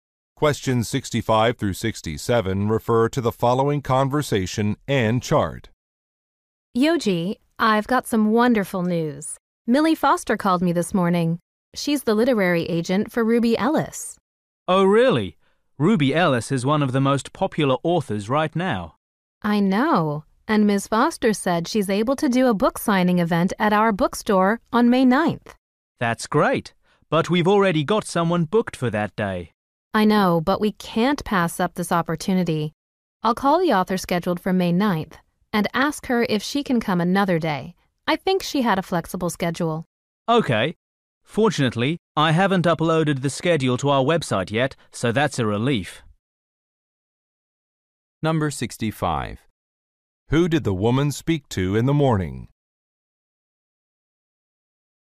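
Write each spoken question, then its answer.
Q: Who did the woman speak to in the morning?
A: A literary agent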